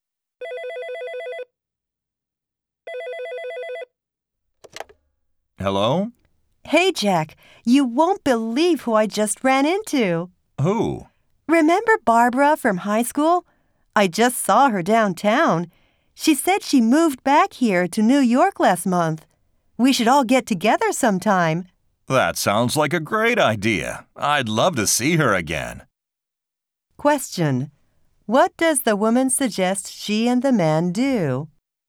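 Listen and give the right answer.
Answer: Get together with Barbara sometime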